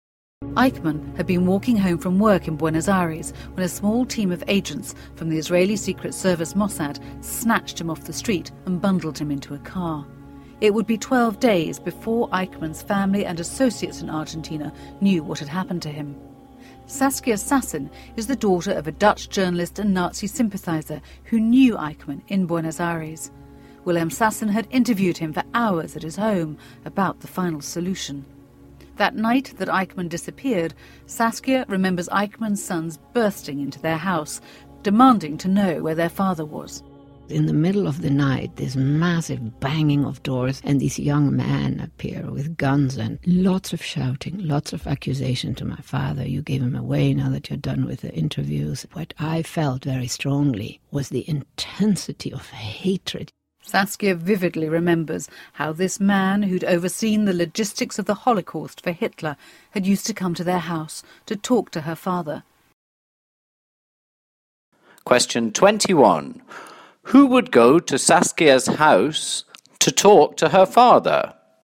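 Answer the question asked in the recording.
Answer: Eichmann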